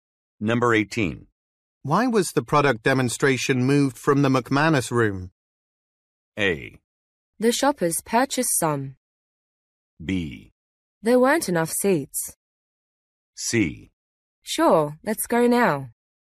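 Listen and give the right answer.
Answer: B: There weren't enough seats.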